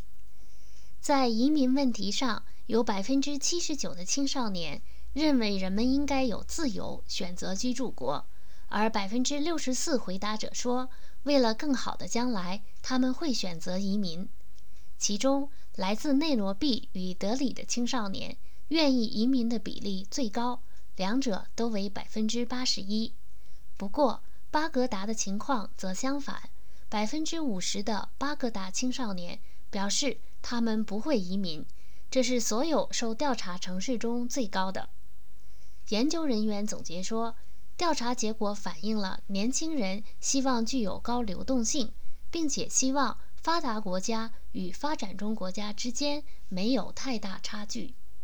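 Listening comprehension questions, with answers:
Please answer the following questions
哪个城市的青少年最不想移民?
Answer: 巴格达

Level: 3rd Year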